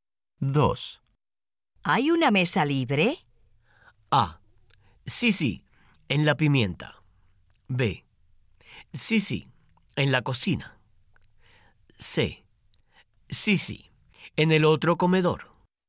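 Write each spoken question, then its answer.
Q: ¿Hay una mesa libre?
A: C: Sí, sí, en el otro comedor.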